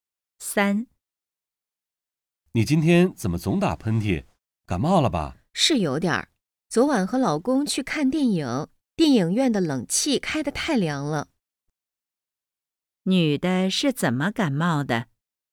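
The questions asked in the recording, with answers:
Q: 女的是怎么感冒的?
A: 电影院的冷气开得太凉了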